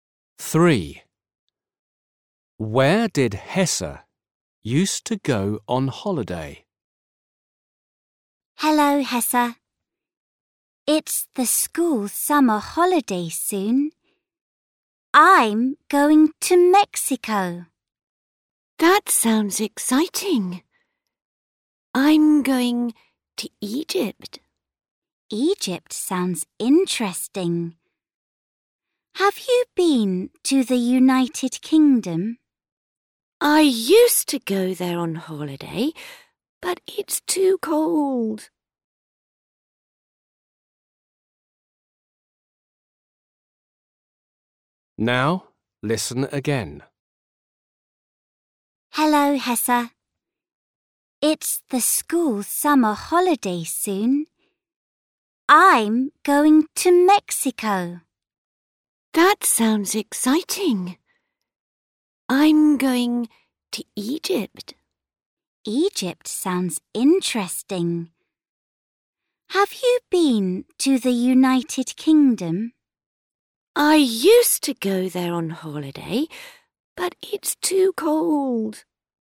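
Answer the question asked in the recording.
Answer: the United Kingdom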